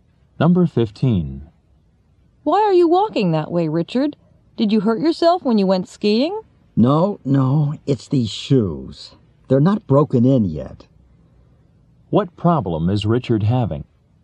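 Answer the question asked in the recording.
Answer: His new shoes hurt because they aren't broken in yet.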